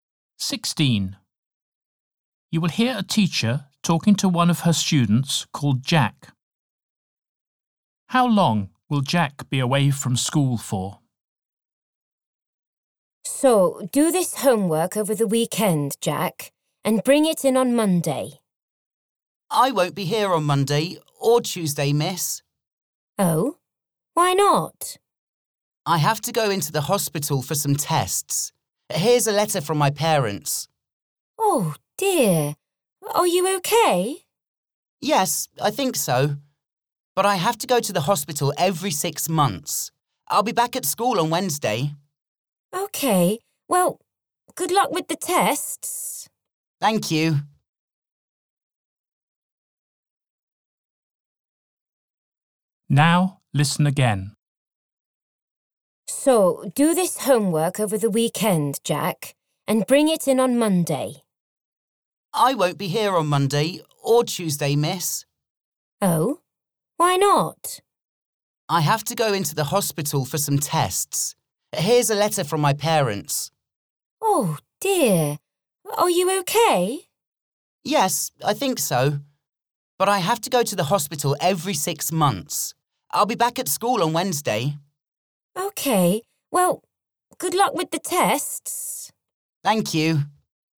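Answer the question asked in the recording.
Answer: Two days (Monday and Tuesday)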